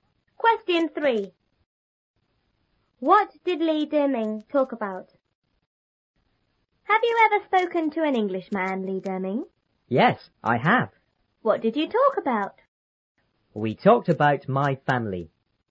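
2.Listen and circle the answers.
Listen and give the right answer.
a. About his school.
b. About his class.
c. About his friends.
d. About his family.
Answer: d. About his family.

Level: 初中英语广州版3B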